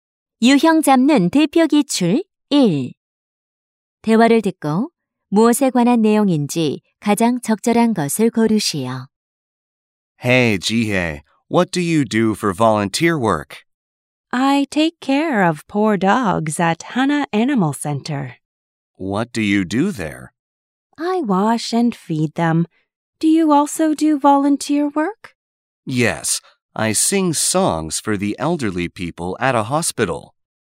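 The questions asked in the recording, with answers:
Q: 대화를 듣고 무엇에 관한 내용인지 가장 적절한 것을 고르시오.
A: 봉사 활동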